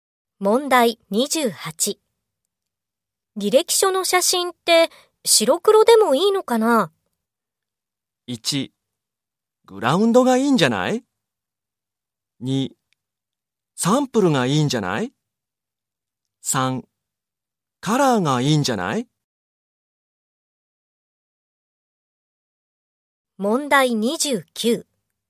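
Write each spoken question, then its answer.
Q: 履歴書の写真って白黒でもいいのかな?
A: 3: カラーがいいんじゃない?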